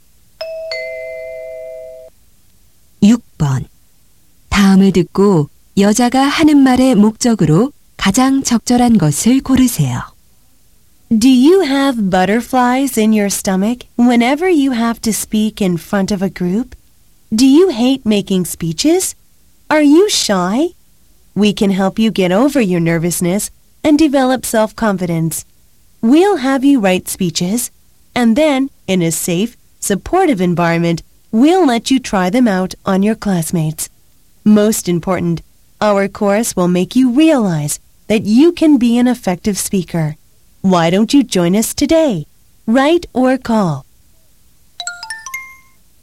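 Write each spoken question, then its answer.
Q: 다음을 듣고 여자가 하는 말의 목적으로 가장 적절한 것을 고르세요.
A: 스피치 강좌 수강생 모집 광고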